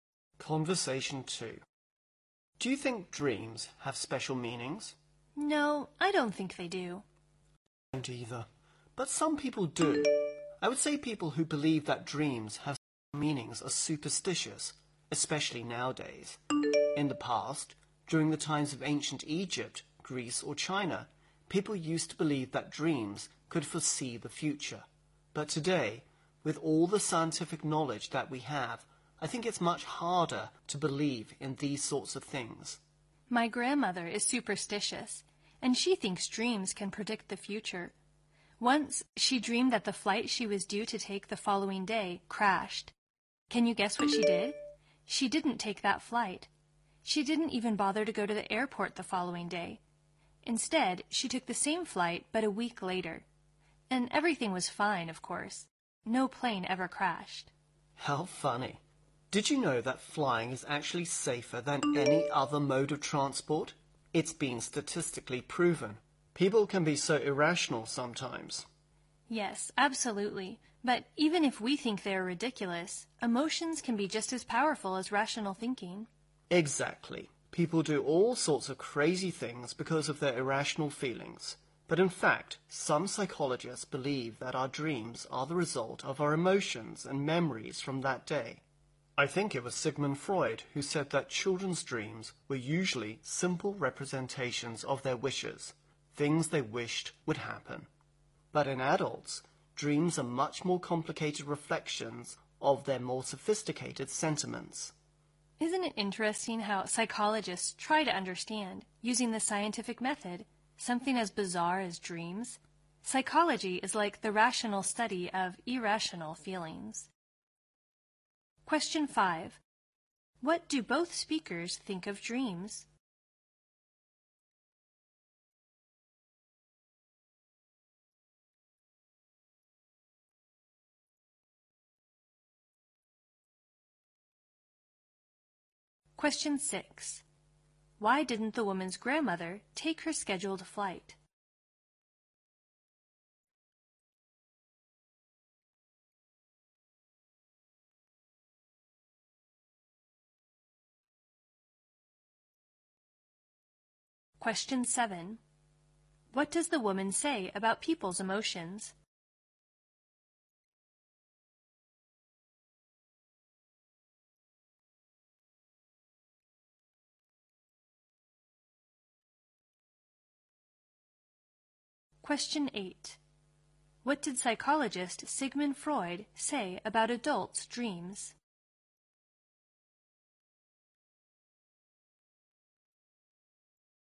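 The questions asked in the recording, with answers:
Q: What do both speakers think of dreams?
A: They don't have special meanings

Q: Why didn't the woman's grandmother take her scheduled flight?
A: She dreamed the flight crashed

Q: What does the woman say about people's emotions?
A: They can be just as powerful as rational thinking

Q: What did psychologist Sigmund Freud say about adults' dreams?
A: They are much more complicated reflections of their more sophisticated sentiments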